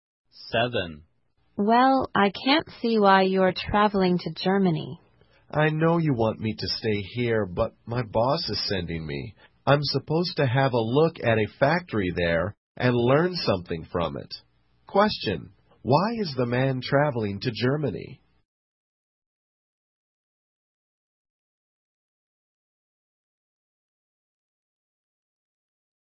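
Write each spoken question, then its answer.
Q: why is the man traveling to Germany?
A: His boss is sending him to look at a factory and learn from it.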